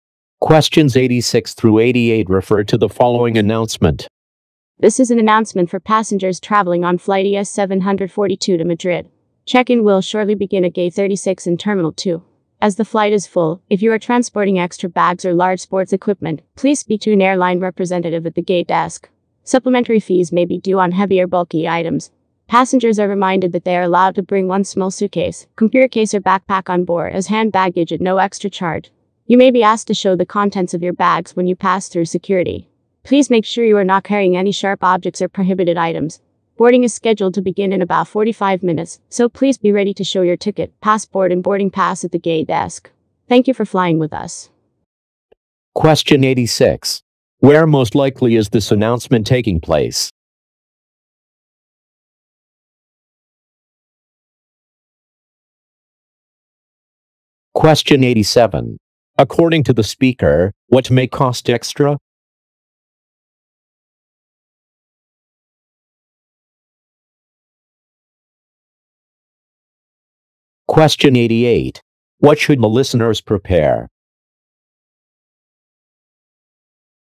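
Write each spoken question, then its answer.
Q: Where most likely is this announcement taking place?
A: At an airport

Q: According to the speaker, what may cost extra?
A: Heavier bulky items

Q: What should the listeners prepare?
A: Their ticket, passport and boarding pass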